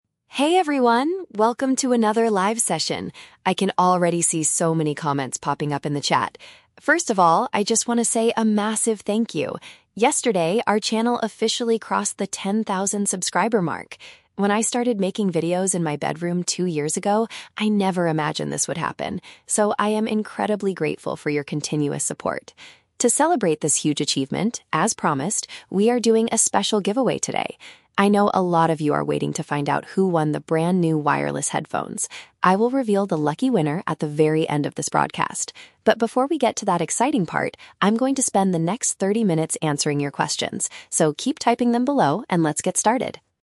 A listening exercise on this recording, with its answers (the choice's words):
Listen to a content creator speaking on a live video stream. For each question, choose the correct answer (A, B, or C).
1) Why is the speaker so thankful at the beginning of the video?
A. She just bought some expensive recording equipment.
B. Her online community has reached a specific size.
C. She has been creating internet content for ten years.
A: Her online community has reached a specific size.

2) What item is the creator going to give to a fan today?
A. A piece of technology for listening to audio.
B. A smart television for their bedroom.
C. A free subscription to her popular channel.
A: A piece of technology for listening to audio.

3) What will the speaker do immediately after the introduction?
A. Read out the name of the competition winner.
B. Reply to inquiries sent by her audience.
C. Teach the viewers how to make better videos.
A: Reply to inquiries sent by her audience.

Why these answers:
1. The speaker says her channel "crossed the ten thousand subscriber mark," which means her online community has reached a specific size. Option (A) is not mentioned. Option (C) is a trap; the number "ten" is used for ten thousand subscribers, and she says she started making videos "two years ago," not ten years.
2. The speaker mentions giving away "brand new wireless headphones," which is technology used for listening to audio. Option (B) is a trap; she mentions her "bedroom" as the place she started making videos, not as a place for a TV. Option (C) is a trap; she mentions the word "subscriber", but she is not giving away a subscription.
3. She says, "before we get to that exciting part [the giveaway], I'm going to spend the next thirty minutes answering your questions." This means she will reply to inquiries. Option (A) is a trap; she explicitly says she will reveal the winner "at the very end of this broadcast," not right now. Option (C) is a trap; she talks about "making videos," but she is not teaching the audience how to do it.

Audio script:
Content Creator: Hey everyone! Welcome to another live session. I can already see so many comments popping up in the chat. First of all, I just want to say a massive thank you. Yesterday, our channel officially crossed the ten thousand subscriber mark! When I started making videos in my bedroom two years ago, I never imagined this would happen. So, I am incredibly grateful for your continuous support. To celebrate this huge achievement, as promised, we are doing a special giveaway today. I know a lot of you are waiting to find out who won the brand new wireless headphones. I will reveal the lucky winner at the very end of this broadcast. But before we get to that exciting part, I'm going to spend the next thirty minutes answering your questions. So, keep typing them below, and let's get started!